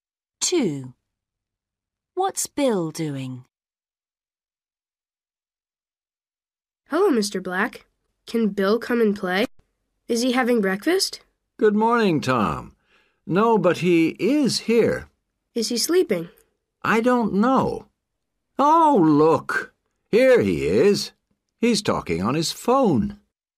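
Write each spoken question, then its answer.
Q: What's Bill doing?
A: Talking on his phone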